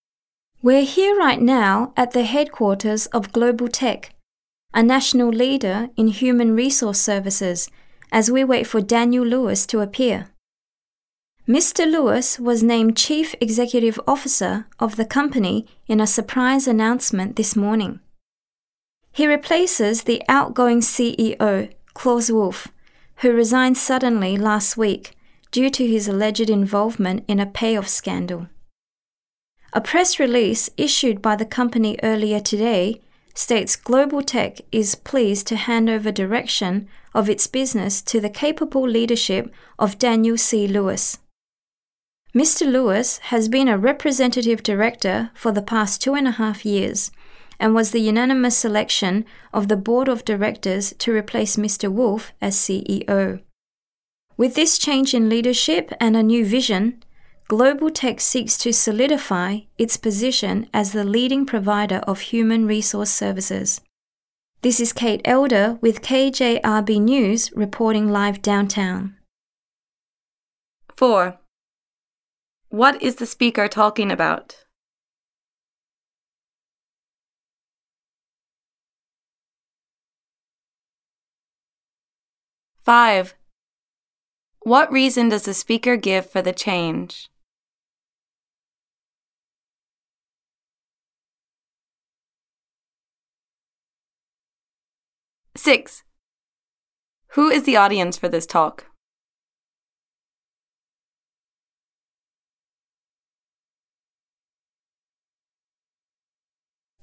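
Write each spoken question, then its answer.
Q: What is the speaker talking about?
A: A new CEO being named at Global Tech

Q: What reason does the speaker give for the change?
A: The former CEO resigned over an alleged payoff scandal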